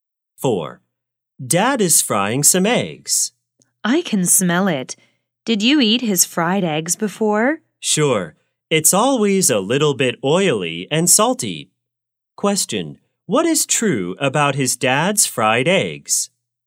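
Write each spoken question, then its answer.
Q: what is true about his dad's fried eggs?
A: They are always a little bit oily and salty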